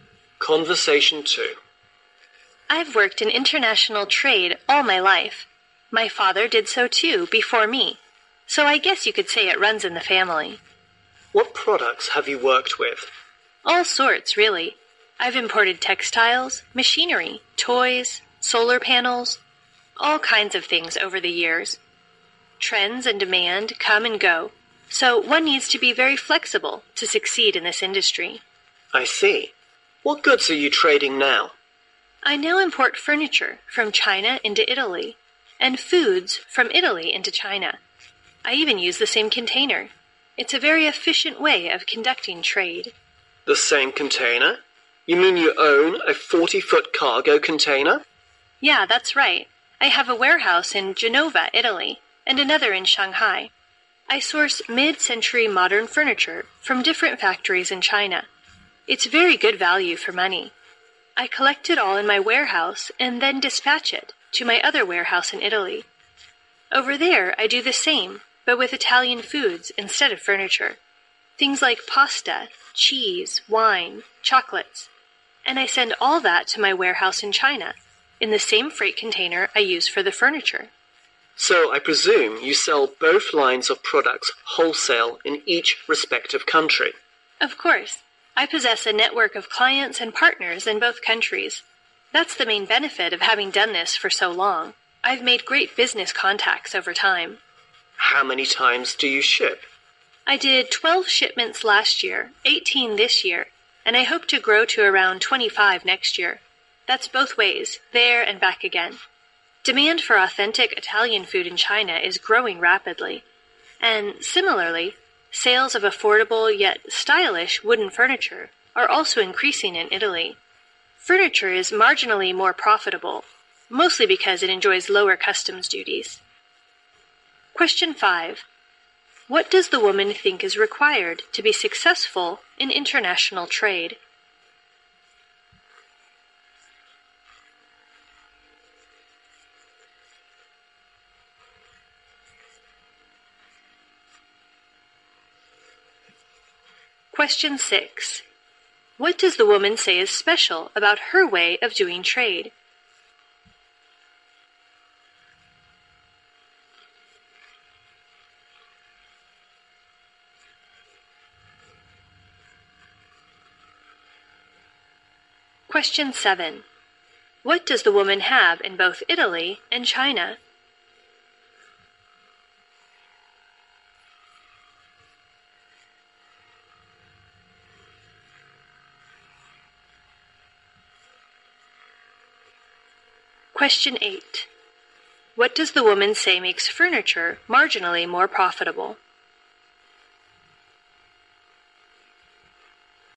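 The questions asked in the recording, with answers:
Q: What does the woman think is required to be successful in international trade?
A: Being very flexible

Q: What does the woman say is special about her way of doing trade?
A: She uses the same container both ways

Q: What does the woman have in both Italy and China?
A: A warehouse

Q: What does the woman say makes furniture marginally more profitable?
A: Lower customs duties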